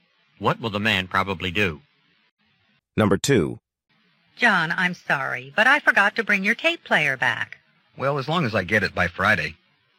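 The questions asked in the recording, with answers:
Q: What does the man mean?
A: It's fine if he gets the tape player back by Friday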